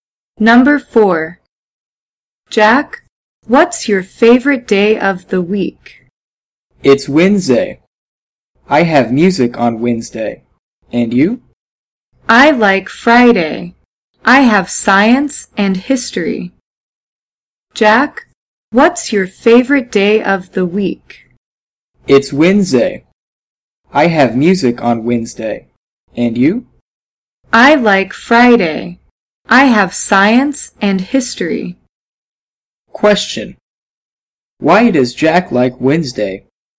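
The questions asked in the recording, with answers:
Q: Why does Jack like Wednesday?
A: He has music on Wednesday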